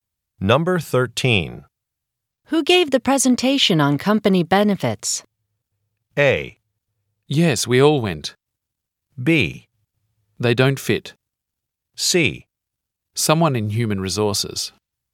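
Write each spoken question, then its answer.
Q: Who gave the presentation on company benefits?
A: C: Someone in human resources.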